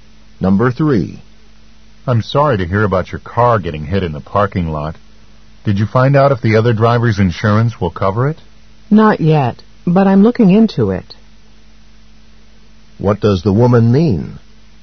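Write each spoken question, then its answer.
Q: What does the woman mean?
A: She doesn't know yet and is looking into it.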